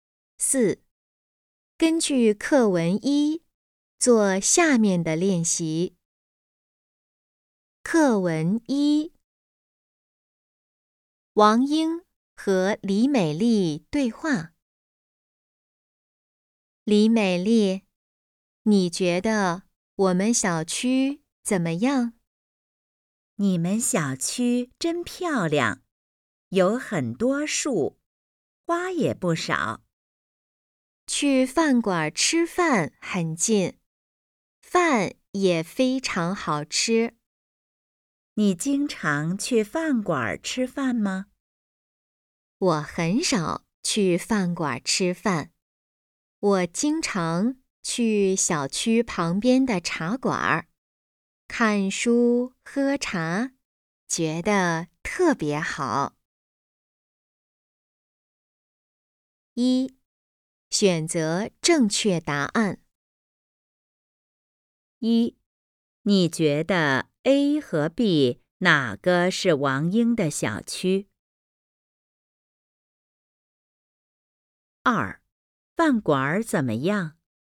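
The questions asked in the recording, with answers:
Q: 饭馆怎么样?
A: 很近,饭也非常好吃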